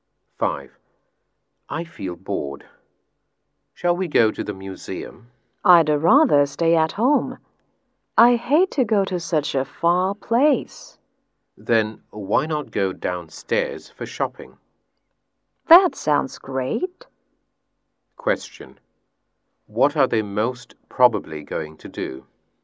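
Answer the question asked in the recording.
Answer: Go shopping downstairs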